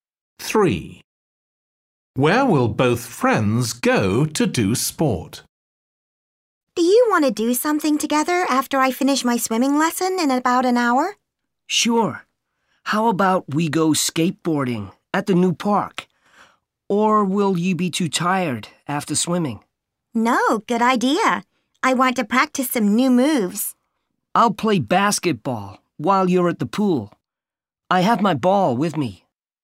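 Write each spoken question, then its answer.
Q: Where will both friends go to do sport?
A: the new park (skateboarding)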